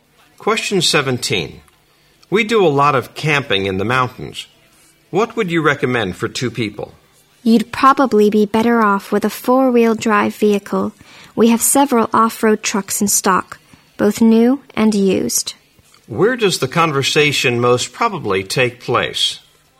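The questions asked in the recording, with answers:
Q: Where does the conversation most probably take place?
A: At a car dealership.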